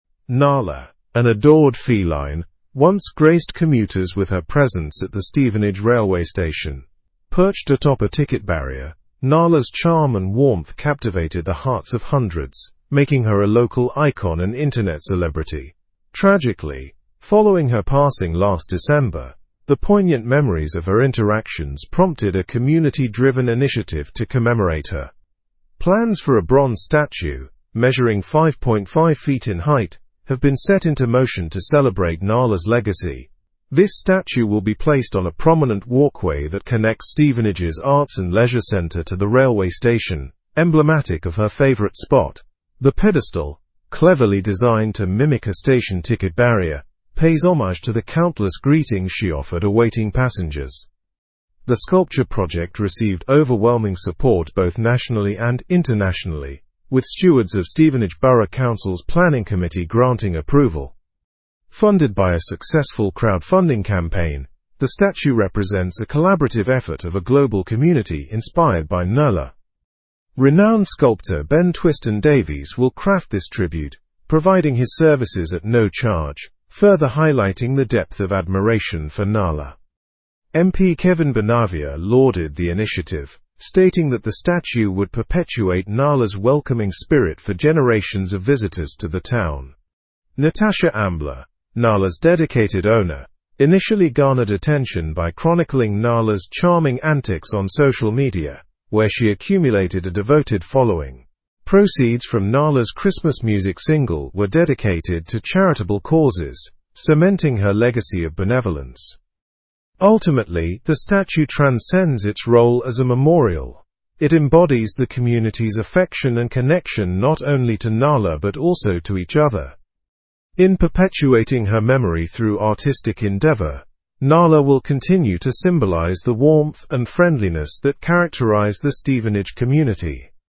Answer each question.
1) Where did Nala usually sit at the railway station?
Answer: Nala often perched atop a ticket barrier at the railway station.

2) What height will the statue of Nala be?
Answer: The statue will be 5.5 feet in height.

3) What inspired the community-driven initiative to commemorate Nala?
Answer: The poignant memories of Nala's interactions inspired the initiative.

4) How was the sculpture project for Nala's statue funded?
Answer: It was funded by a successful crowdfunding campaign.

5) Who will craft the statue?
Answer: Renowned sculptor Ben Twiston-Davies will craft the statue.

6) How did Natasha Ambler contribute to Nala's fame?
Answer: She chronicled Nala's antics on social media, attracting a devoted audience.

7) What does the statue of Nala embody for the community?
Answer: The statue embodies the community's affection for Nala and symbolizes warmth and friendliness.

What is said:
Nala, an adored feline, once graced commuters with her presence at the Stevenage railway station. Perched atop a ticket barrier, Nala's charm and warmth captivated the hearts of hundreds, making her a local icon and internet celebrity. Tragically, following her passing last December, the poignant memories of her interactions prompted a community-driven initiative to commemorate her.
Plans for a bronze statue, measuring 5.5 feet in height, have been set into motion to celebrate Nala's legacy. This statue will be placed on a prominent walkway that connects Stevenage's Arts and Leisure Centre to the railway station, emblematic of her favorite spot. The pedestal, cleverly designed to mimic a station ticket barrier, pays homage to the countless greetings she offered awaiting passengers.
The sculpture project received overwhelming support both nationally and internationally, with stewards of Stevenage Borough Council's planning committee granting approval. Funded by a successful crowdfunding campaign, the statue represents a collaborative effort of a global community inspired by Nala. Renowned sculptor Ben Twiston-Davies will craft this tribute, providing his services at no charge, further highlighting the depth of admiration for Nala.
MP Kevin Bonavia lauded the initiative, stating that the statue would perpetuate Nala's welcoming spirit for generations of visitors to the town. Natasha Ambler, Nala's dedicated owner, initially garnered attention by chronicling Nala's charming antics on social media, where she accumulated a devoted following. Proceeds from Nala's Christmas music single were dedicated to charitable causes, cementing her legacy of benevolence.
Ultimately, the statue transcends its role as a memorial. It embodies the community's affection and connection not only to Nala but also to each other. In perpetuating her memory through artistic endeavor, Nala will continue to symbolize the warmth and friendliness that characterize the Stevenage community.
Original news source: Stevenage station's cat Nala to get memorial bronze statue (BBC)
Show model answerA: Nala often perched atop a ticket barrier at the railway station.
In perpetuating her memory through artistic ?, Nala will continue to symbolize the warmth and friendliness that characterize the Stevenage community.

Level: Level 4